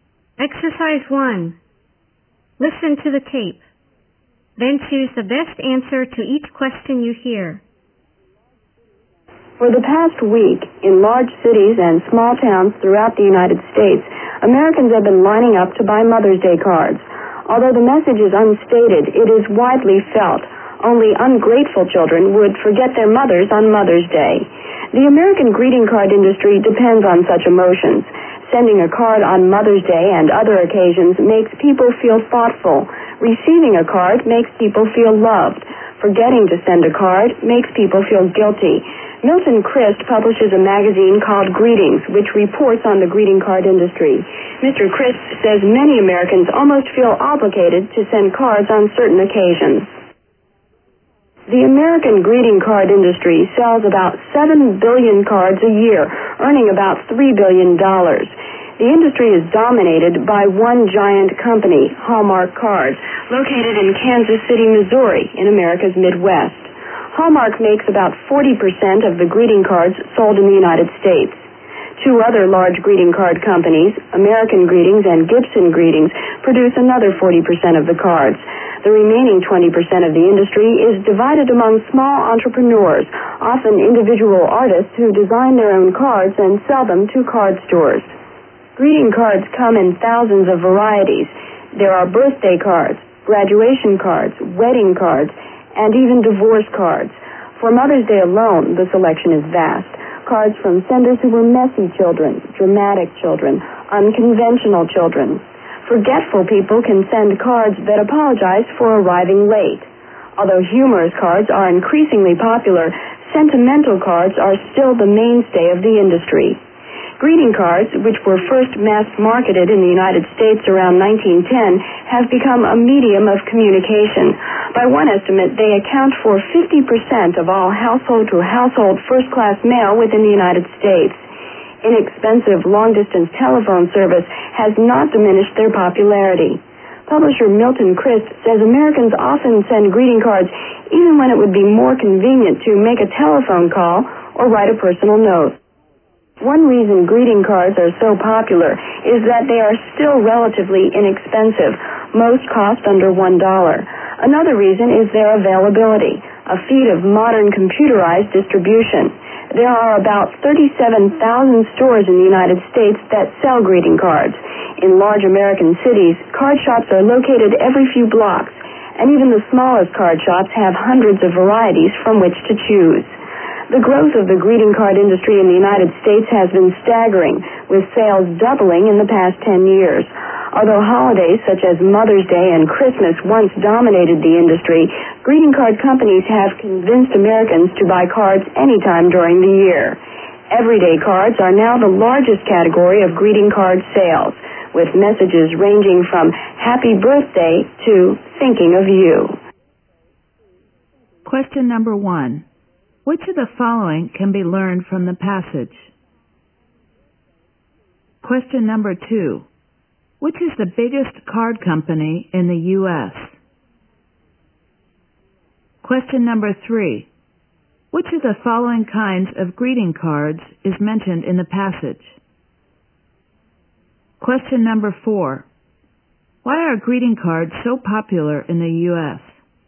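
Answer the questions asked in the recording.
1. Hallmark Cards
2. They are relatively inexpensive and widely available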